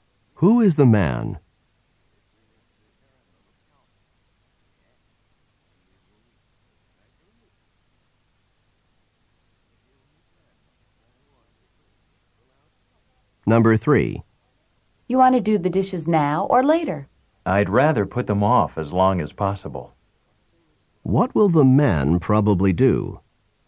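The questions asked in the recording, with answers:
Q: What will the man probably do?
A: Do the dishes later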